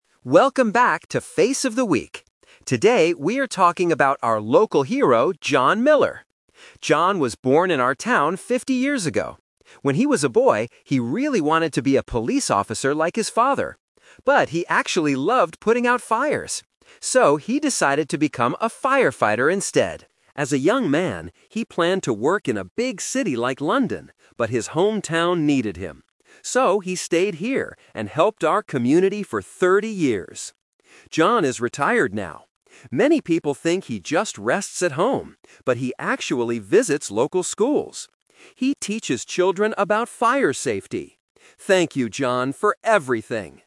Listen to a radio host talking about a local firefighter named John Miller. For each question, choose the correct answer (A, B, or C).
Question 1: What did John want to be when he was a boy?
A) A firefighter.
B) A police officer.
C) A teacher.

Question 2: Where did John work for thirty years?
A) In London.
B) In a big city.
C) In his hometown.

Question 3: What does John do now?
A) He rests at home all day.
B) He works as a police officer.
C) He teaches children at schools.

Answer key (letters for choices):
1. B
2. C
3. C

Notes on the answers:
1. The radio host says, "...he really wanted to be a police officer like his father." Why the traps are wrong: Option A is a "Twist Trap". He became a firefighter later, but it wasn't his first dream as a boy. Option C is a distractor because he teaches children now.
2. The host explains his decision: "...but his hometown needed him. So, he stayed here and helped our community for thirty years." Why the traps are wrong: Options A and B are the "Twist Trap". He planned to work in a big city like London, but he didn't go there.
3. The host describes his current activity: "...he actually visits local schools. He teaches children about fire safety." Why the traps are wrong: Option A is the trap. The host mentions that "Many people think he just rests at home", but he actually doesn't. Option B is his childhood dream, not his current job.

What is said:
Radio Host: Welcome back to 'Face of the Week'. Today, we are talking about our local hero, John Miller. John was born in our town fifty years ago. When he was a boy, he really wanted to be a police officer like his father. But he actually loved putting out fires. So, he decided to become a firefighter instead. As a young man, he planned to work in a big city like London, but his hometown needed him. So, he stayed here and helped our community for thirty years. John is retired now. Many people think he just rests at home, but he actually visits local schools. He teaches children about fire safety. Thank you, John, for everything!